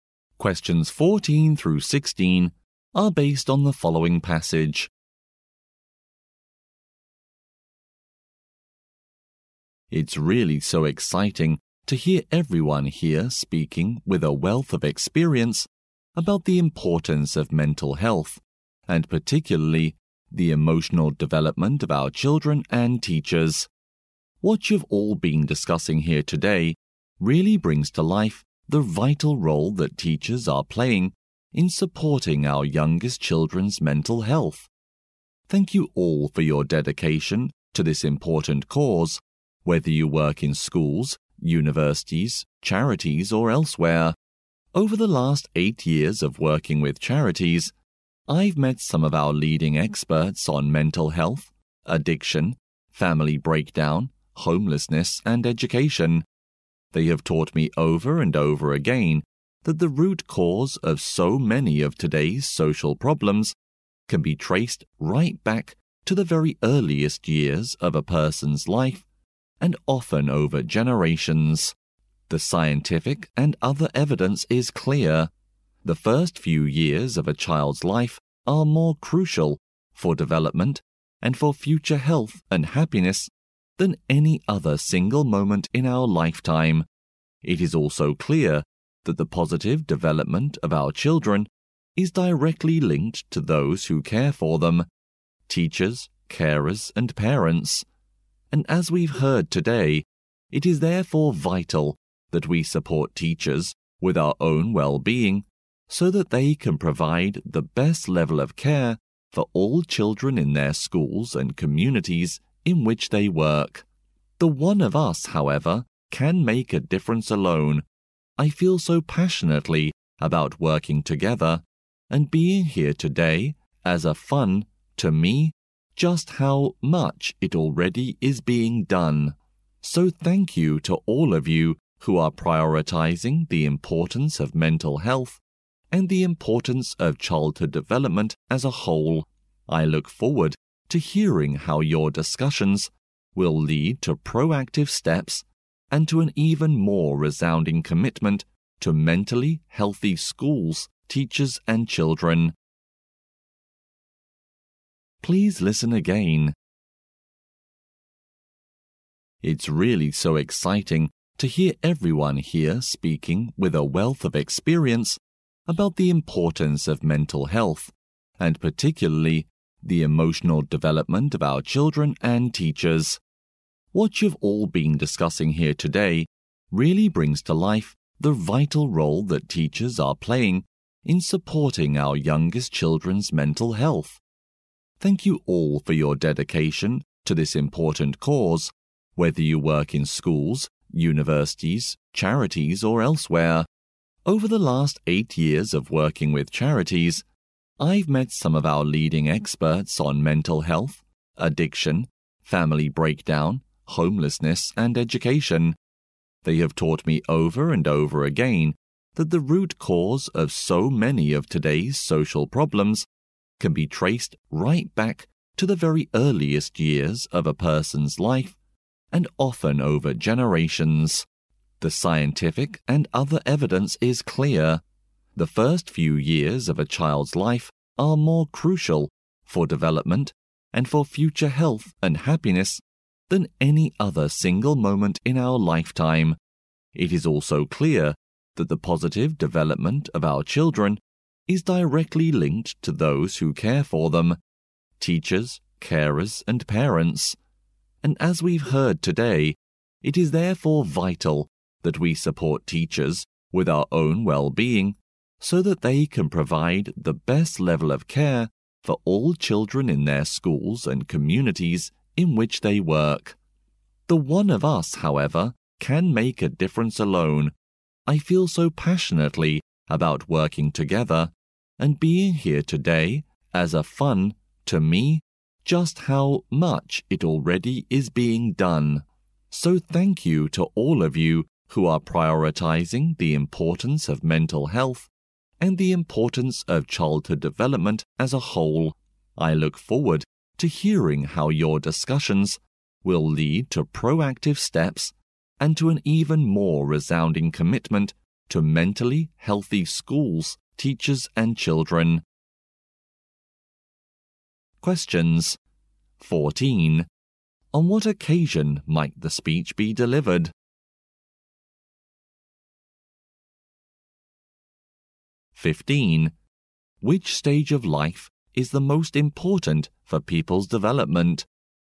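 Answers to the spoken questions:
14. At a meeting on mental health
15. The first few years of life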